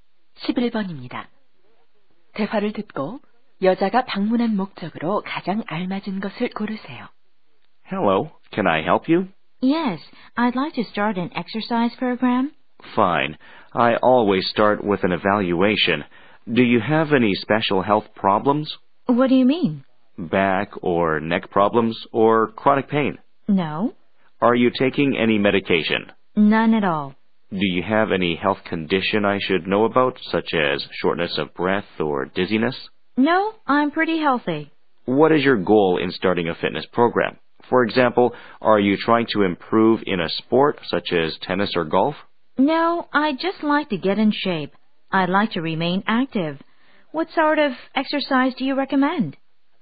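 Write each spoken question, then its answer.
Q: 대화를 듣고 여자가 방문한 목적으로 가장 알맞은 것을 고르세요.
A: 운동 프로그램을 시작하려고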